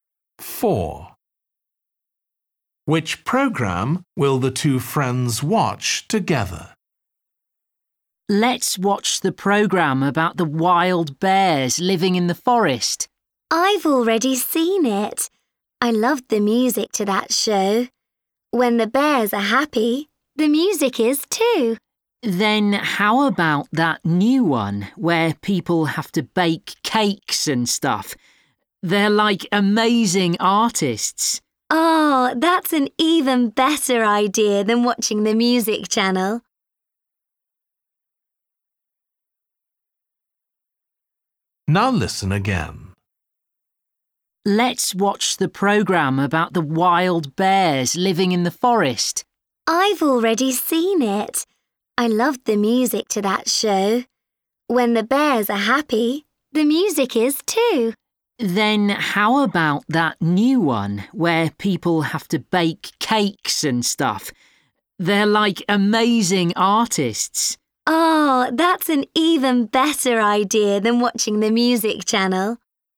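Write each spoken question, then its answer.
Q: Which program will the two friends watch together?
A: The baking program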